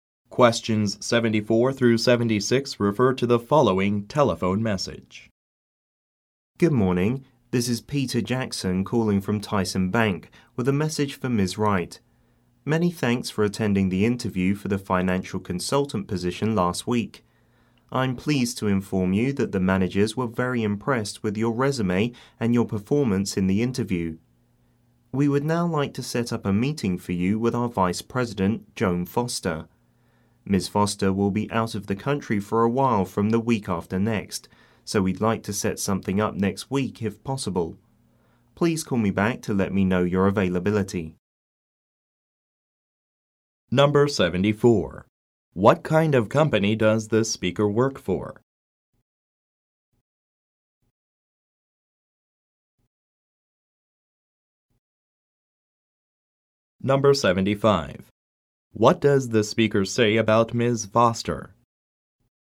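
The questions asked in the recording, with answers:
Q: What kind of company does the speaker work for?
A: A bank

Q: What does the speaker say about Ms. Foster?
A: She will be out of the country for a while from the week after next

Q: What does the speaker ask the listener to do?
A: Call him back to say when she is available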